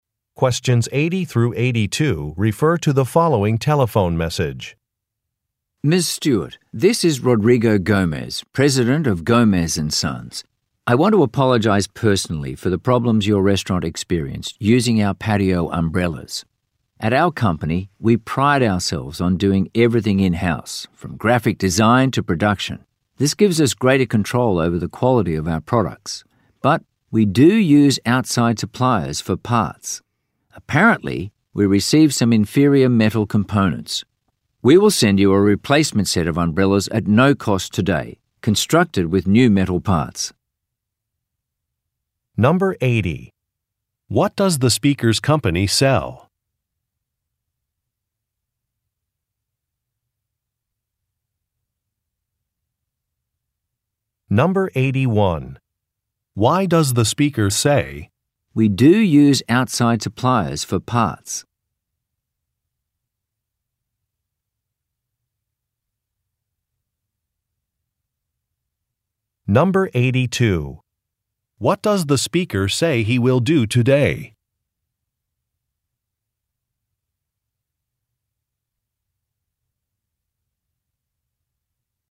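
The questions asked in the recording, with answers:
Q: What does the speaker's company sell?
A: Patio umbrellas

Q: What does the speaker say he will do today?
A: Send a free replacement set of umbrellas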